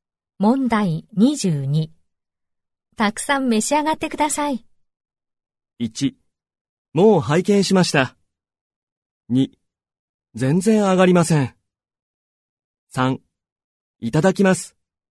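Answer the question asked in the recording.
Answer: 3: いただきます。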